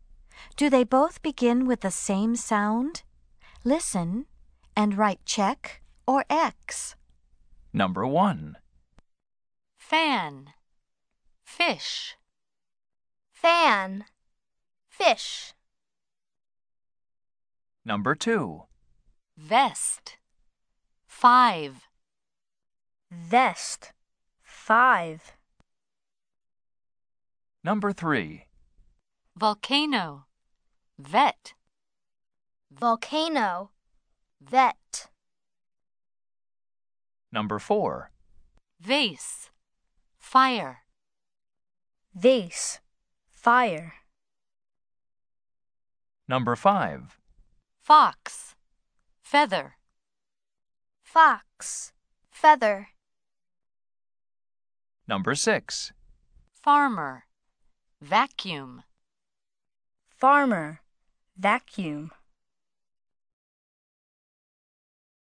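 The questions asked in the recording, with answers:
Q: Fan. Fish.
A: Yes (check): both begin with f

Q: Vest. Five.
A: No (X): v and f

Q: Volcano. Vet.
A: Yes (check): both begin with v

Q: Vase. Fire.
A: No (X): v and f

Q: Fox. Feather.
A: Yes (check): both begin with f

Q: Farmer. Vacuum.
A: No (X): f and v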